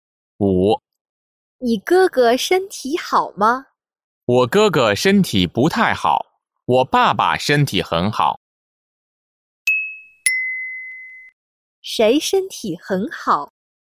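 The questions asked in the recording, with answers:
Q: 谁身体很好?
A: 我爸爸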